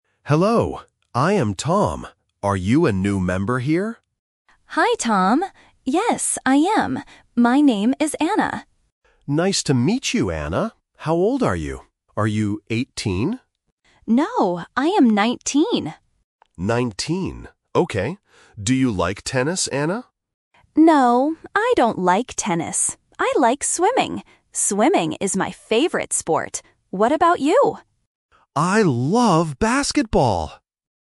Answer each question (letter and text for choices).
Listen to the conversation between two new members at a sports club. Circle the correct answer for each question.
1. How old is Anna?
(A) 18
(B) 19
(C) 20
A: (B) 19

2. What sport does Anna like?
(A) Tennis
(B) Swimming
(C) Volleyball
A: (B) Swimming

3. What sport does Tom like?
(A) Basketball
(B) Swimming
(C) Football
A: (A) Basketball

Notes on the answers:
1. Anna clearly says, "I am 19." Option (A) 18 is the trap because Tom asks "Are you 18?", but Anna says "No." Option (C) 20 is not mentioned.
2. Anna explicitly states, "I like swimming." Option (A) Tennis is the trap because Tom asks about it, but Anna says "I don't like tennis." Option (C) Volleyball is not mentioned.
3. Tom says "I love basketball!" at the end. Option (B) Swimming is a trap because it is Anna's favorite sport, not Tom's. Option (C) Football is not mentioned.

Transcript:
Tom: Hello. I am Tom. Are you a new member here?
Anna: Hi, Tom. Yes, I am. My name is Anna.
Tom: Nice to meet you, Anna. How old are you? Are you 18?
Anna: No, I am 19.
Tom: 19. Okay. Do you like tennis, Anna?
Anna: No, I don't like tennis. I like swimming. Swimming is my favorite sport. What about you?
Tom: I love basketball!

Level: A1